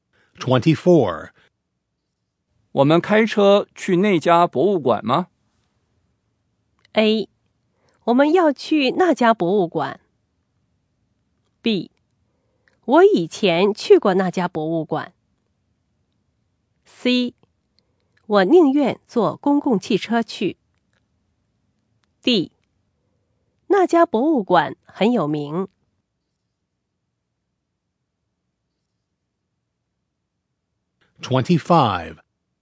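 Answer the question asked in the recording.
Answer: C: 我宁愿坐公共汽车去。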